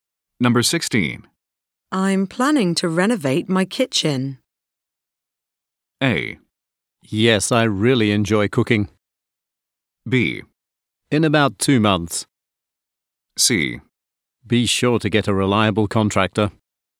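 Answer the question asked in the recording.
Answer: C: Be sure to get a reliable contractor.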